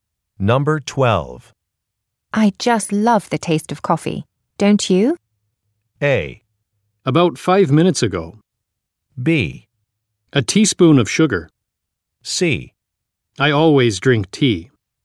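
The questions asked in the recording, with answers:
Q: I just love the taste of coffee. Don't you?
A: C: I always drink tea.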